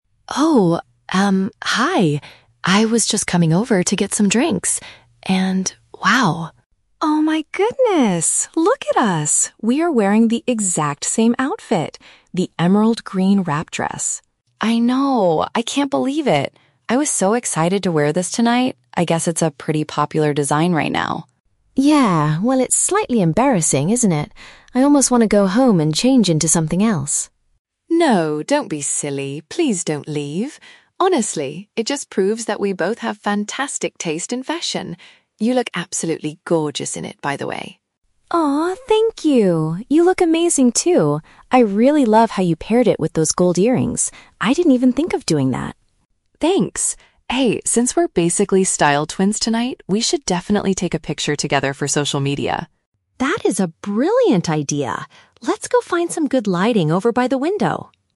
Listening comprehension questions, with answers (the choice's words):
Listen to the conversation between two guests at a party. For each question, choose the correct answer (A, B, or C).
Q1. What is Mia's initial reaction upon realizing they are wearing the same outfit?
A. She feels awkward and considers leaving to put on different clothes.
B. She is immediately excited to take a photo with her new friend.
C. She is annoyed because she spent a lot of money on a unique dress.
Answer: She feels awkward and considers leaving to put on different clothes.

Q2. How does Chloe positively reframe the situation?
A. She suggests they tell everyone they planned it together.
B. She believes it simply shows they both have excellent style choices.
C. She offers to lend Mia a jacket to cover up the dress.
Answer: She believes it simply shows they both have excellent style choices.

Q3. What specific detail does Mia admire about Chloe's appearance?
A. The beautiful way she styled her hair for the party.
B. The fact that the green dress fits her so perfectly.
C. The choice of jewelry she used to match the clothing.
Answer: The choice of jewelry she used to match the clothing.

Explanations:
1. Mia states that it's "slightly embarrassing" (paraphrased as feeling awkward) and says she wants to "go home and change into something else" (paraphrased as leaving to put on different clothes). Option B is a trap because taking a photo happens later in the conversation, not initially. Option C is plausible for this type of situation but is never mentioned in the audio.
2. Chloe tells Mia that it "proves that we both have fantastic taste in fashion," which is paraphrased as having "excellent style choices." Option A is a plausible way to handle the situation, but they do not suggest lying to other guests. Option C is a trap; Chloe tells her not to change, but does not offer her a jacket.
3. Mia compliments Chloe by saying, "I really love how you paired it with those gold earrings." Earrings are a type of "jewelry." Option A is not mentioned in the audio. Option B is a trap because while she says Chloe looks "amazing," the specific detail she admires is the earrings, not the fit of the dress itself.

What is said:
Chloe: Oh, um, hi! I was just coming over to get some drinks and... wow.
Mia: Oh my goodness! Look at us. We are wearing the exact same outfit. The emerald green wrap dress.
Chloe: I know! I can't believe it. I was so excited to wear this tonight. I guess it's a pretty popular design right now.
Mia: Yeah, well, it's slightly embarrassing, isn't it? I almost want to go home and change into something else.
Chloe: No, don't be silly! Please don't leave. Honestly, it just proves that we both have fantastic taste in fashion. You look absolutely gorgeous in it, by the way.
Mia: Aw, thank you! You look amazing, too. I really love how you paired it with those gold earrings. I didn't even think of doing that.
Chloe: Thanks! Hey, since we're basically style twins tonight, we should definitely take a picture together for social media.
Mia: That is a brilliant idea! Let's go find some good lighting over by the window.